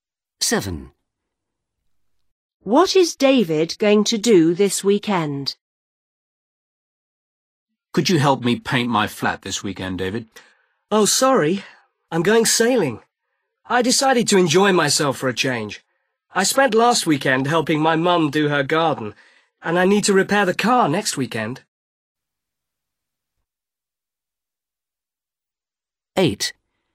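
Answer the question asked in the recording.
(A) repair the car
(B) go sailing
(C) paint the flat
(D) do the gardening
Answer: (B) go sailing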